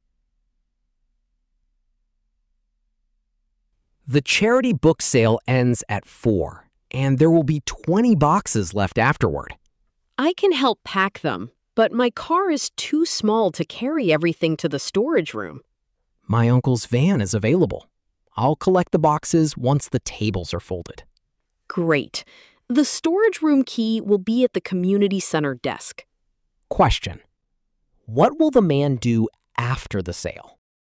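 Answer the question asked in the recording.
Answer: Collect the boxes with his uncle's van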